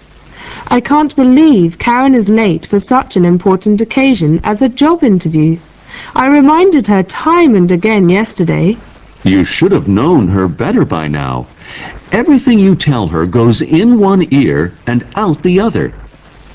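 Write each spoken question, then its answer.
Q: What does the man imply?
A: Karen never pays attention to what she is told, so she forgets things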